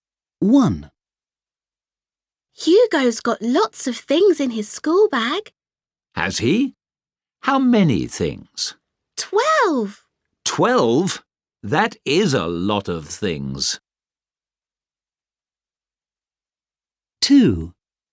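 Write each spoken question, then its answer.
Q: How many things?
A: 12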